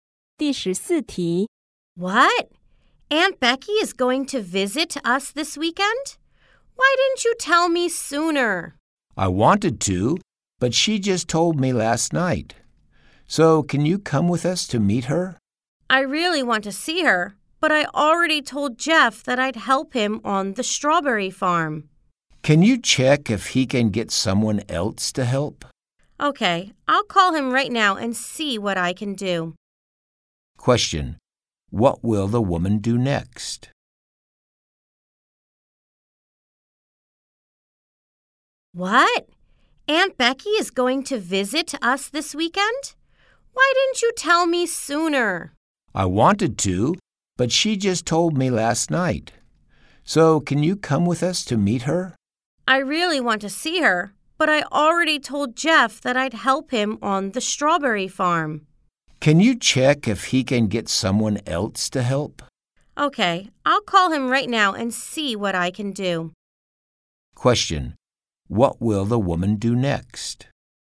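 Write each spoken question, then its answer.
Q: What will the woman do next?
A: Call Jeff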